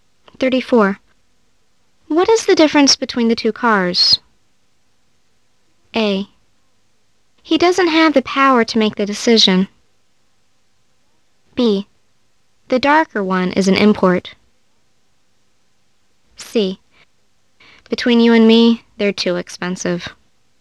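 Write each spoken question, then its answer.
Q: What is the difference between the two cars?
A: B: The darker one is an import.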